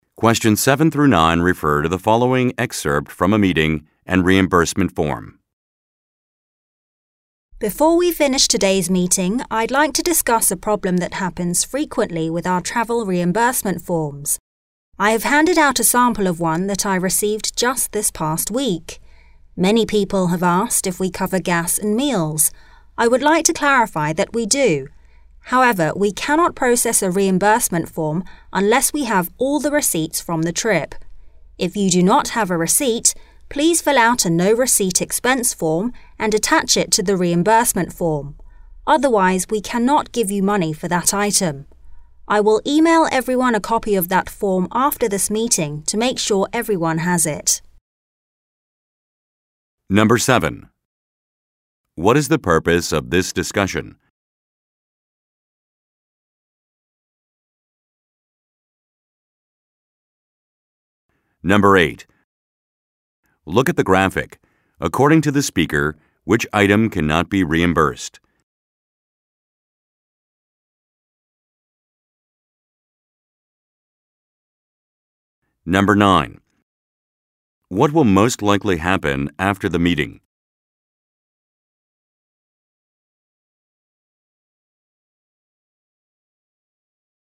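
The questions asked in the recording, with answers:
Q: What is the purpose of this discussion?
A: To explain the rules for travel reimbursement forms (all receipts are needed)

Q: What will most likely happen after the meeting?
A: The speaker will email everyone a copy of the no-receipt expense form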